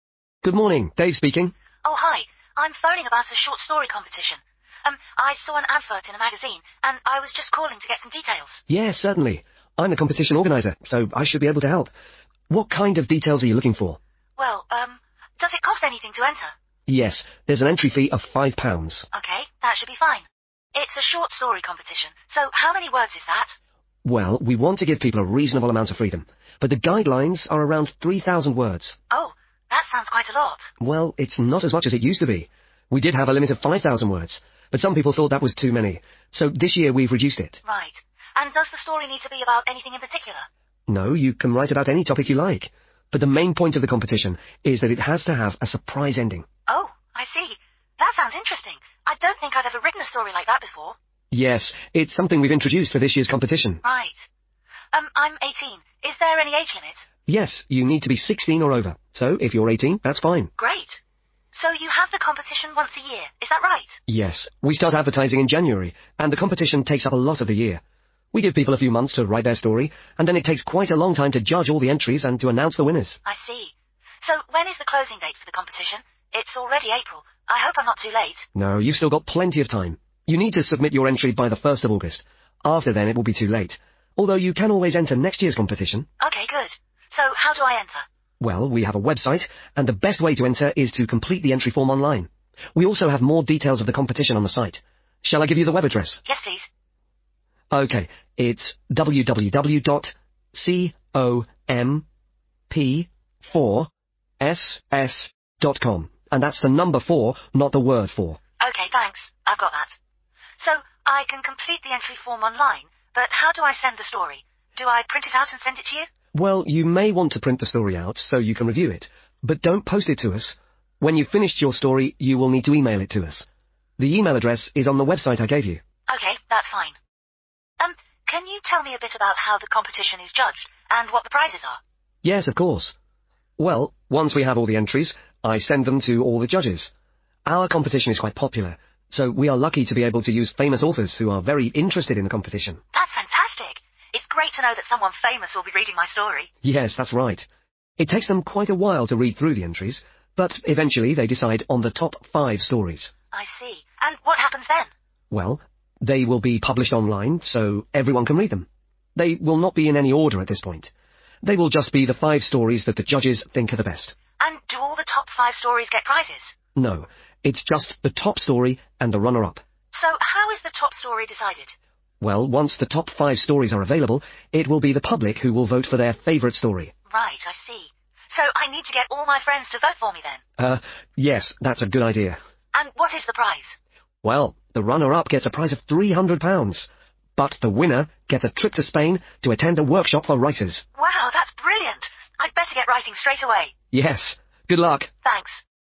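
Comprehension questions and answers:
Complete the notes below. Write NO MORE THAN TWO WORDS AND/OR A NUMBER for each answer.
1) Length of story: approximately 1 ...............................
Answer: 3,000 words

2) Story must include: a 2 ..........................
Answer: surprise ending

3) Minimum age: 3 .....................................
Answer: 16

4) Last entry date: 1st 4 ..............................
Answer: August

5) Web address: www. 5...........................com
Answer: comp4ss

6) Don't: 6 ...................... the story to the organisers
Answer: post

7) The competition is judged by 7 ..........................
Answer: famous authors

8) The top five stories will be available 8 .........................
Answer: online

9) The top story will be chosen by the 9 ........................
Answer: public

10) The first prize is a place at a writers' workshop in 10 ...........................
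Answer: Spain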